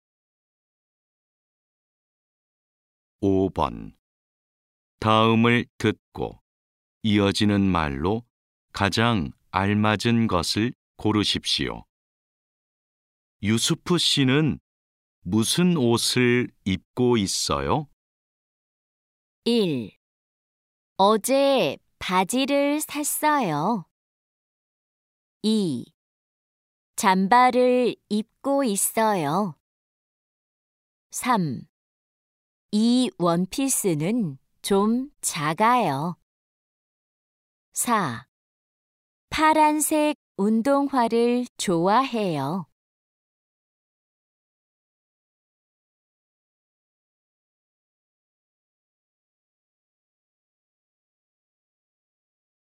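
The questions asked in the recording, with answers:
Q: 유수프 씨는 무슨 옷을 입고 있어요?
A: 2: 잠바를 입고 있어요.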